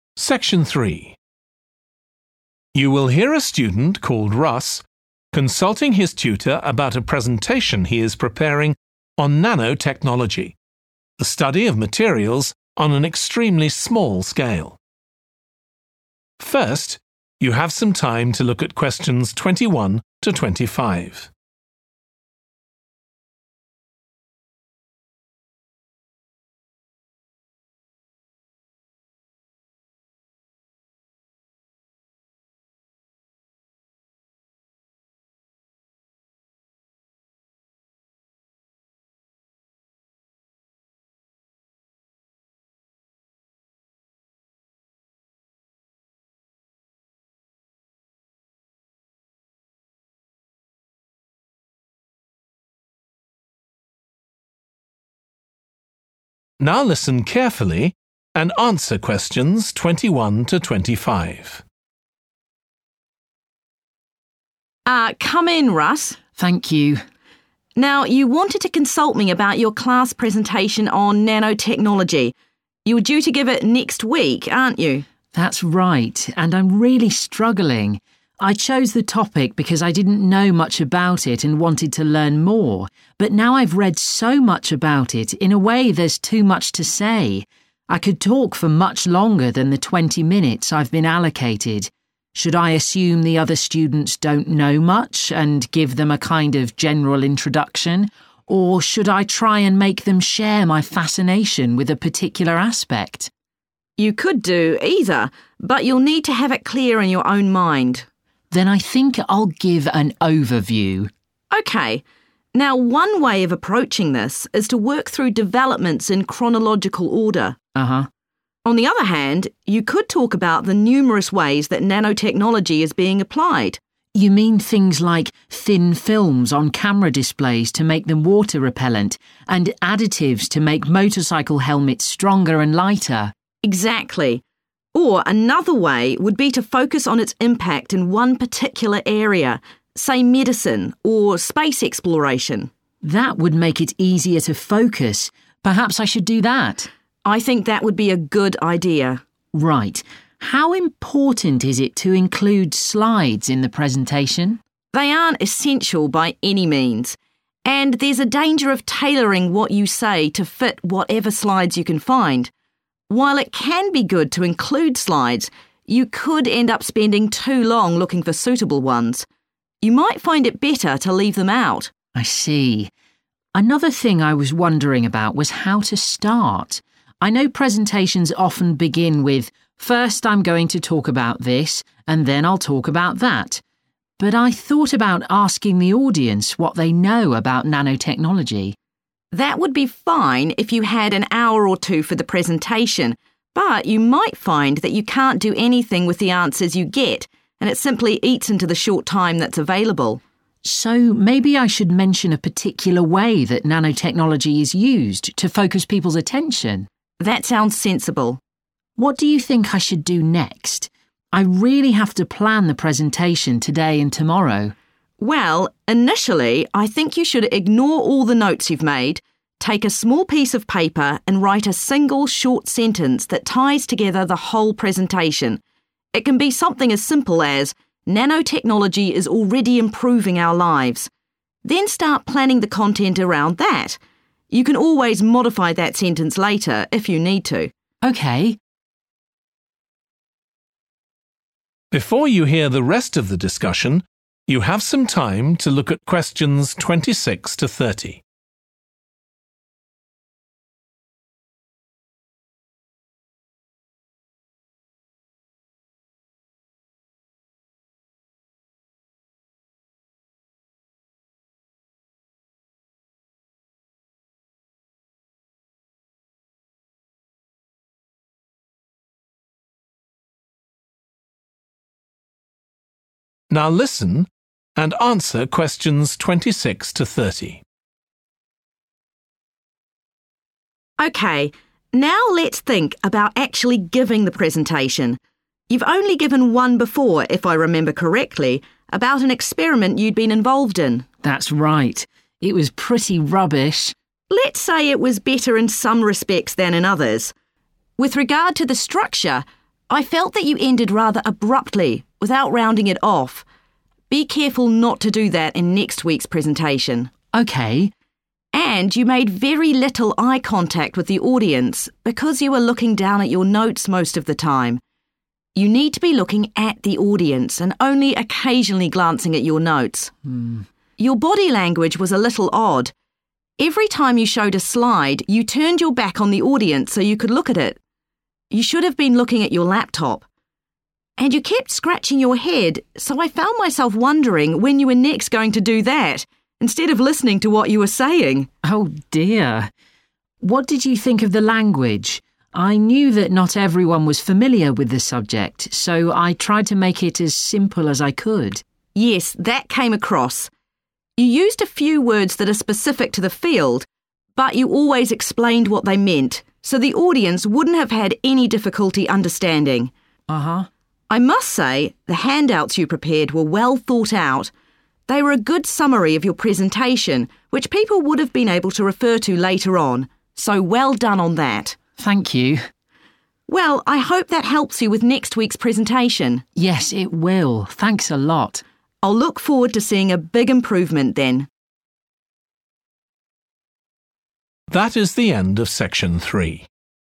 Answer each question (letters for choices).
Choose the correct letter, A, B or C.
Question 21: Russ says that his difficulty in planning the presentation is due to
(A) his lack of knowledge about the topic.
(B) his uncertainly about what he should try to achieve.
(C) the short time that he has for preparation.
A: B

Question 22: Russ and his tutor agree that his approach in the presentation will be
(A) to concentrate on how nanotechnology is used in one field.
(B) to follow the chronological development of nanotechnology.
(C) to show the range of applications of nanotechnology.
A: A

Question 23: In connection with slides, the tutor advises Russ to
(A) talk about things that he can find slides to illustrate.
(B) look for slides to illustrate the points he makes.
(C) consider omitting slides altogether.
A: C

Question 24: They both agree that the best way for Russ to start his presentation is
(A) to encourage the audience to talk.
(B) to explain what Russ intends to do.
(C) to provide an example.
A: C

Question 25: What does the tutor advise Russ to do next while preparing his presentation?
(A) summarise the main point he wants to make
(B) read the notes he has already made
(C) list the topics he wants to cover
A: A

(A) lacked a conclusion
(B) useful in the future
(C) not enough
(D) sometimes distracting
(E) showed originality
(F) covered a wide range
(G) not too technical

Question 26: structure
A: A

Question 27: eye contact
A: C

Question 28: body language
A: D

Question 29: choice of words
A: G

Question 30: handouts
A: B

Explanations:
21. The transcript shows Russ questioning whether he should give a broad introduction to nanotechnology for students who might not know much about it, or focus on a specific aspect to get them interested. Answer Explanation: The answer B suggests that Russ is uncertain about what he should aim for in his presentation. Reason For Correctness: The correct answer is B because Russ is contemplating whether to provide a general overview to his audience or try to engage them by focusing on a particular aspect. This uncertainty about the presentation's goal aligns with choice B, which mentions his uncertainty about what he should try to achieve.
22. The transcript suggests that focusing on the impact of nanotechnology in one specific area is one possible approach for the presentation. Answer Explanation: The answer chosen, 'A,' means to concentrate on how nanotechnology is used in one field. Reason For Correctness: The correct answer is 'A' because it aligns with the idea presented in the excerpt, emphasizing focusing on the impact in a specific area, therefore supporting the notion of concentrating on how nanotechnology is used in one field.
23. The transcript suggests that although using slides in a presentation can be good, it might take a long time to find suitable ones. So, it might be better to not include slides at all. Answer Explanation: The answer suggests that it could be a good idea to omit slides completely from the presentation. Reason For Correctness: The correct answer is C because the excerpt advises that it might be more efficient to leave out slides to avoid spending too much time searching for suitable ones, indicating that considering omitting slides altogether could be a reasonable approach.
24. The transcript suggests that Russ is considering mentioning a specific example of how nanotechnology is used to grab the audience's interest. Answer Explanation: The answer 'C' suggests that providing an example would be the best way for Russ to start his presentation. Reason For Correctness: The correct answer is 'C' because by providing a specific example of how nanotechnology is used, Russ can capture the audience's attention and make the topic more relatable and engaging for them.
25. The transcript suggests that Russ needs to compose a concise sentence that captures the main idea of his entire presentation. Answer Explanation: The answer advises Russ to summarize the main point he wants to make, which aligns with the suggestion in the excerpt. Reason For Correctness: The correct answer is 'A' (summarise the main point he wants to make) because summarizing the main point in a single sentence can help Russ tie together and effectively communicate the key message of his presentation to his audience.
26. The transcript mentions that the speaker felt Russ ended his presentation too suddenly without properly concluding it. Answer Explanation: The answer indicates that the presentation lacked a proper conclusion. Reason For Correctness: The correct answer is 'A' because the feedback provided in the excerpt points out that Russ's presentation abruptly ended without a proper concluding part, which aligns with the interpretation that the presentation lacked a conclusion.
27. The transcript explains that Russ did not look at the audience much during the presentation and mostly focused on reading his notes. It suggests that it's important to look at the audience more than the notes. Answer Explanation: The answer indicates that the speakers felt there was not enough eye contact made by Russ during the presentation. Reason For Correctness: The correct answer is 'C' because the speakers mentioned that Russ made very little eye contact with the audience, stating that he mostly looked down at his notes. Therefore, the response 'not enough' fits well with the explanation given in the excerpt.
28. The transcript describes how Russ's body language in the presentation was not ideal. It mentions that he turned his back to the audience to look at slides and kept scratching his head, which could be distracting. Answer Explanation: The answer 'D' indicates that the comments about Russ's body language in the presentation were sometimes distracting. Reason For Correctness: The correct answer is 'D' because the feedback about Russ's body language being distracting aligns with the description in the excerpt, where it mentions him turning his back on the audience and scratching his head, leading to a less effective presentation delivery.
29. The transcript is saying that although some technical words were used by the speaker, Russ, he always made sure to explain them in a way that made it easy for the audience to understand. Answer Explanation: The answer indicates that the presentation did not include overly complicated or difficult technical language that might confuse the audience. Reason For Correctness: The correct answer 'G' is 'not too technical' because the excerpt explains that the speaker used field-specific words but ensured that the audience could comprehend them by providing explanations. This implies that the presentation maintained a balance between technical content and accessibility for the audience, meeting the criteria of 'not too technical.'
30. The transcript is saying that the handouts Russ prepared were well done. They were a good summary of his presentation that people could use later on. Answer Explanation: The answer means that the handouts Russ made would be helpful or valuable for future use. They would be good to have and refer back to. Reason For Correctness: The correct answer is 'B' because the excerpt mentioned that the handouts were a good summary and something people could refer to in the future, indicating their usefulness for future reference.

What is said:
TUTOR: Ah ... come in, Russ.
RUSS: Thank you.
TUTOR: Now you wanted to consult me about your class presentation on nanotechnology – you're due to give it in next week, aren't you?
RUSS: That's right. And I'm really struggling. I chose the topic because I didn't know much about it and wanted to learn more, but now I've read so much about it, in a way there's too much to say – I could talk for much longer than the twenty minutes I've been allocated. Should I assume the other students don't know much, and give them a kind of general introduction, or should I try and make them share my fascination with a particular aspect?
TUTOR: You could do either, but you'll need to have it clear in your own mind.
RUSS: Then I think I'll give an overview.
TUTOR: OK. Now, one way of approaching this is to work through developments in chronological order.
RUSS: Uh-huh.
TUTOR: On the other hand, you could talk about the numerous ways that nanotechnology is being applied.
RUSS: You mean things like thin films on camera displays to make them water-repellent, and additives to make motorcycle helmets stronger and lighter.
TUTOR: Exactly. Or another way would be to focus on its impact in one particular area, say medicine, or space exploration.
RUSS: That would make it easier to focus. Perhaps I should do that.
TUTOR: I think that would be a good idea.
RUSS: Right. How important is it to include slides in the presentation?
TUTOR: They aren't essential, by any means. And there's a danger of tailoring what you say to fit whatever slides you can find. While it can be good to includes slides, you could end up spending too long looking for suitable ones. You might find it better to leave them out.
RUSS: I see. Another thing I was wondering about was how to start. I know presentations often begin with 'First I'm going to talk about this, and then I'll talk about that', but I thought about asking the audience what they know about nanotechnology.
TUTOR: That would be fine if you had an hour or two for the presentation, but you might find that you can't do anything with the answers you get, and it simply eats into the short time that's available.
RUSS: So, maybe I should mention a particular way that nanotechnology is used, to focus people's attention.
TUTOR: That sounds sensible.
RUSS: What do you think I should do next? I really have to plan the presentation today and tomorrow.
TUTOR: Well, initially I think you should ignore all the notes you've made, take a small piece of paper, and write a single short sentence that ties together the whole presentation: it can be something as simple as 'Nanotechnology is already improving our lives'. Then start planning the content around that. You can always modify that sentence later, if you need to.
RUSS: OK.
TUTOR: OK, now let's think about actually giving the presentation. You've only given one before, if I remember correctly, about an experiment you'd been involved in.
RUSS: That's right. It was pretty rubbish!
TUTOR: Let's say it was better in some respects than in others. With regard to the structure. I felt that you ended rather abruptly, without rounding it off. Be careful not to do that in next week's presentation.
RUSS: OK.
TUTOR: And you made very little eye contact with the audience, because you were looking down at your notes most of the time. You need to be looking at the audience and only occasionally glancing at your notes.
TUTOR: Your body language was a little odd. Every time you showed a slide, you turned your back on the audience so you could look at it – you should have been looking at your laptop. And you kept scratching your head, so I found myself wondering when you were next going to do that, instead of listening to what you were saying!
RUSS: Oh dear. What did you think of the language? I knew that not everyone was familiar with the subject, so I tried to make it as simple as I could.
TUTOR: Yes, that came across. You used a few words that are specific to the field, but you always explained what they meant, so the audience wouldn't have had any difficulty understanding.
RUSS: Uh-huh.
TUTOR: I must say the handouts you prepared were well thought out. They were a good summary of your presentation, which people would be able to refer to later on. So well done on that.
RUSS: Thank you.
TUTOR: Well, I hope that helps you with next week's presentation.
RUSS: Yes, it will. Thanks a lot.
TUTOR: I'll look forward to seeing a big improvement, then.